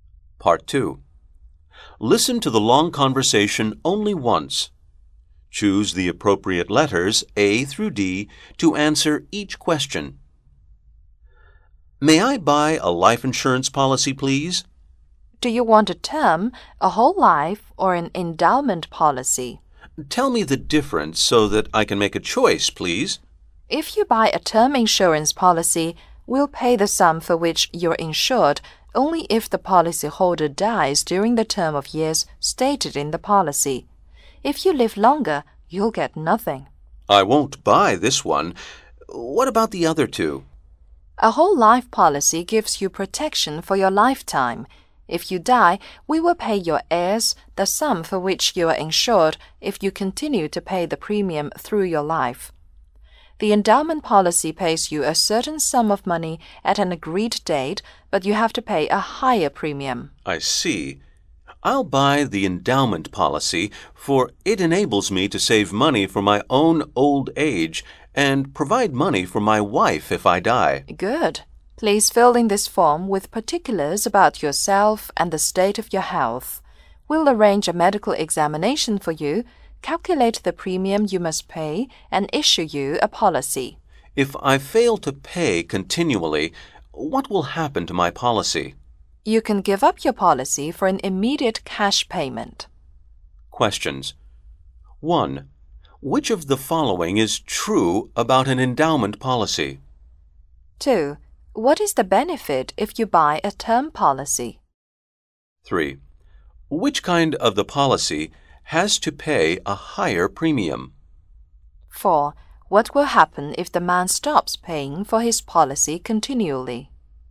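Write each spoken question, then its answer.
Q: What is the benefit if you buy a term policy?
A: The insured sum is paid only if the policyholder dies during the stated term

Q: Which kind of the policy...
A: The endowment policy

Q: What will happen if the man stops paying for his policy continually?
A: He can give up the policy for an immediate cash payment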